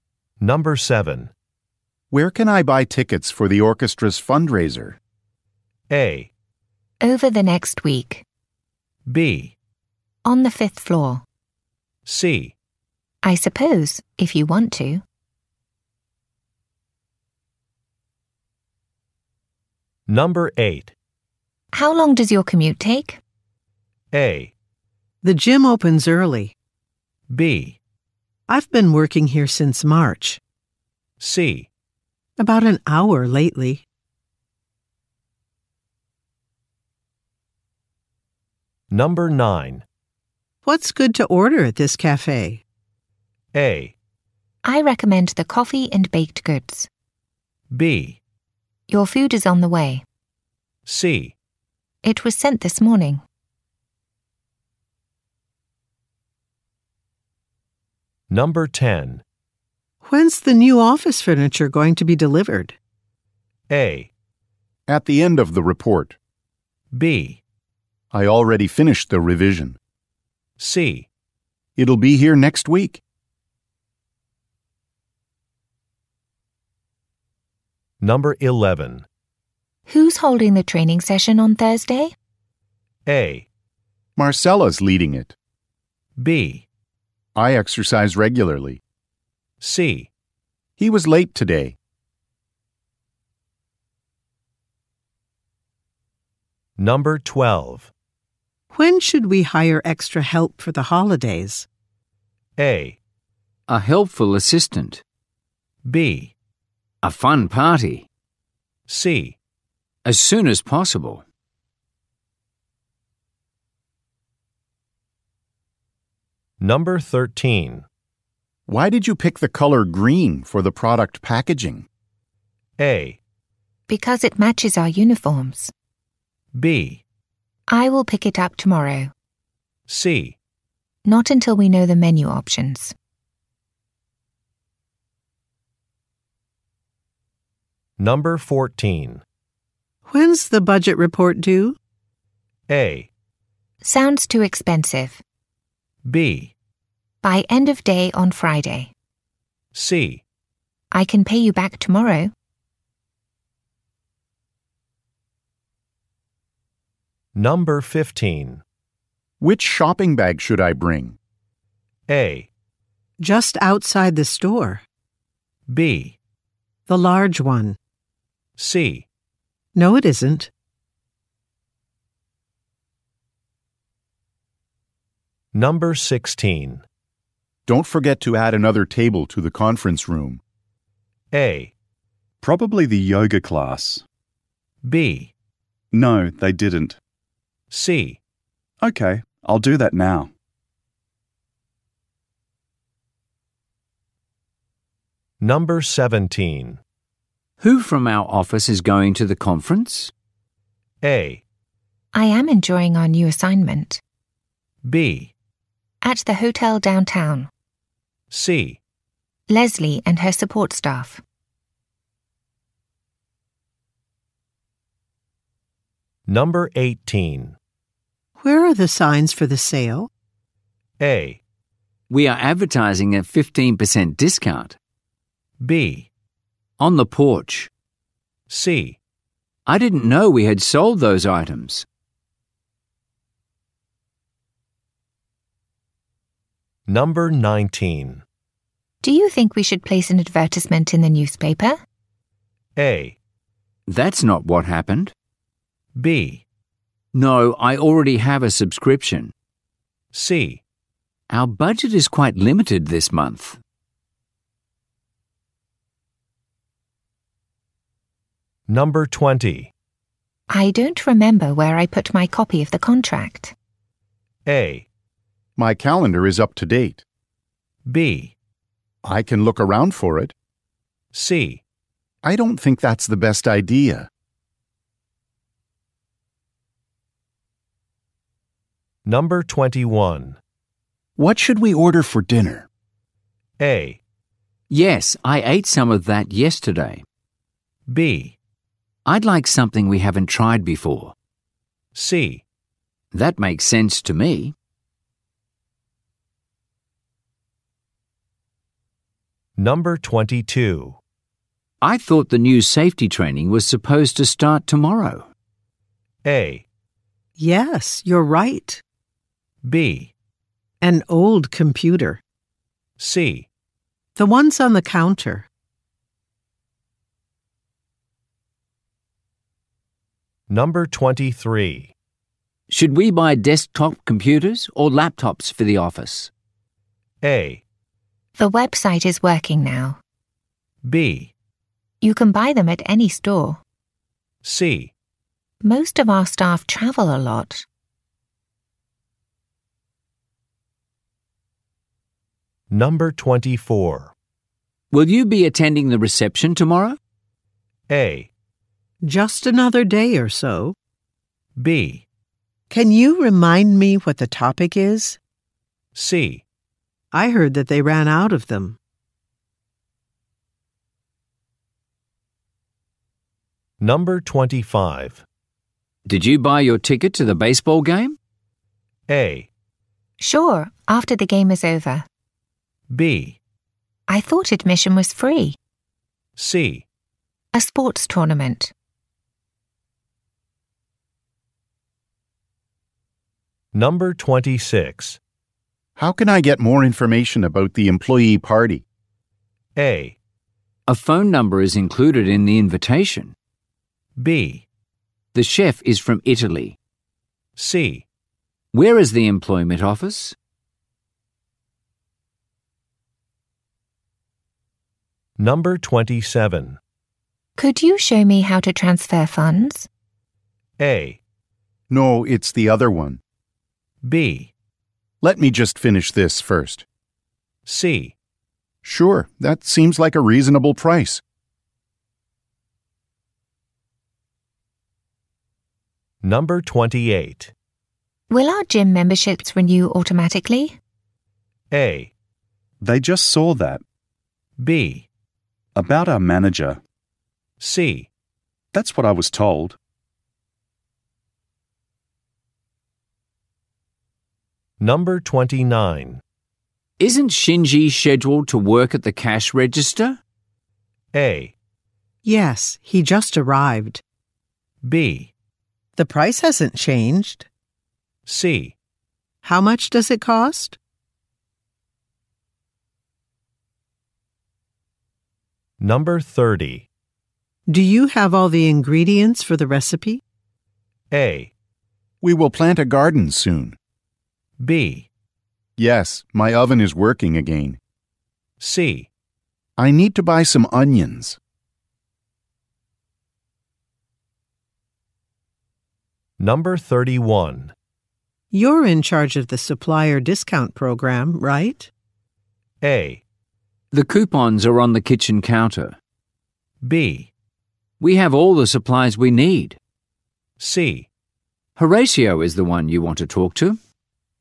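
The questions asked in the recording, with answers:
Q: Where can I buy tickets for the orchestra's fundraiser?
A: B: On the fifth floor.

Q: How long does your commute take?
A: C: About an hour lately.

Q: What's good to order at this cafe?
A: A: I recommend the coffee and baked goods.

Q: When's the new office furniture going to be delivered?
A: C: It'll be here next week.

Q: Who's holding the training session on Thursday?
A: A: Marcella's leading it.

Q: When should we hire extra help for the holidays?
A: C: As soon as possible.

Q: Why did you pick the color green for the product packaging?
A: A: Because it matches our uniforms.

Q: When's the budget report due?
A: B: By end of day on Friday.

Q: Which shopping bag should I bring?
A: B: The large one.

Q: Don't forget to add another table to the conference room.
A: C: Okay, I'll do that now.

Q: Who from our office is going to the conference?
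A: C: Leslie and her support staff.

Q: Where are the signs for the sale?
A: B: On the porch.

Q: Do you think we should place an advertisement in the newspaper?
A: C: Our budget is quite limited this month.

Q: I don't remember where I put my copy of the contract.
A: B: I can look around for it.

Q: What should we order for dinner?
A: B: I'd like something we haven't tried before.

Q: I thought the new safety training was supposed to start tomorrow.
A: A: Yes, you're right.

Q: Should we buy desktop computers or laptops for the office?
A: C: Most of our staff travel a lot.

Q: Will you be attending the reception tomorrow?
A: B: Can you remind me what the topic is?

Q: Did you buy your ticket to the baseball game?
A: B: I thought admission was free.

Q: How can I get more information about the employee party?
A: A: A phone number is included in the invitation.

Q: Could you show me how to transfer funds?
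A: B: Let me just finish this first.

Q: Will our gym memberships renew automatically?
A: C: That's what I was told.

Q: Isn't Shinji scheduled to work at the cash register?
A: A: Yes, he just arrived.

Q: Do you have all the ingredients for the recipe?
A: C: I need to buy some onions.

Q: You're in charge of the supplier discount program, right?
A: C: Horatio is the one you want to talk to.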